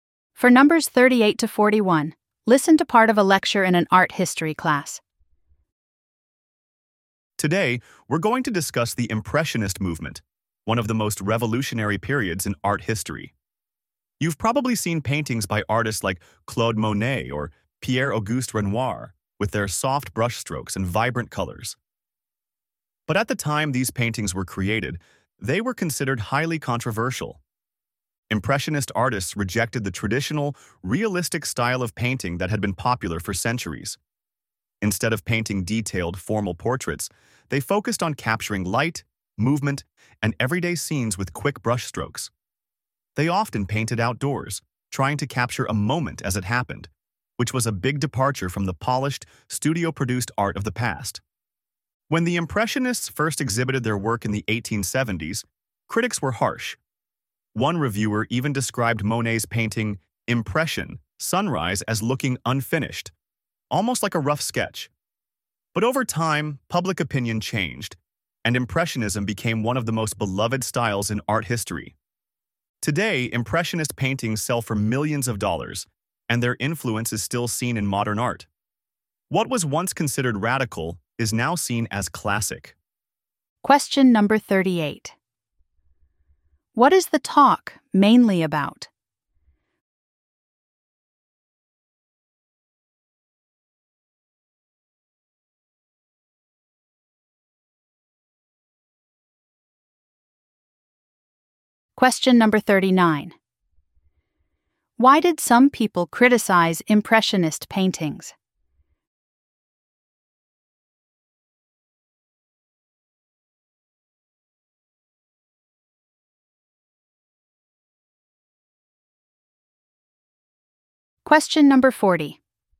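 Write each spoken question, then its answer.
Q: What is the talk mainly about?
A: The Impressionist movement

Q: Why did some people criticize Impressionist paintings?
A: They looked unfinished

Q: Why does the professor mention Impression, Sunrise?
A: As an example of harsh criticism, called unfinished like a sketch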